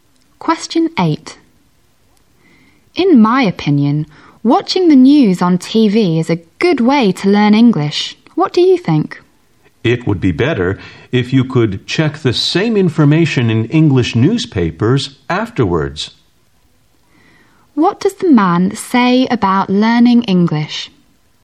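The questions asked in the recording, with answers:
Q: What does the man say about learning English?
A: It would be better to also check the same news in English newspapers afterwards.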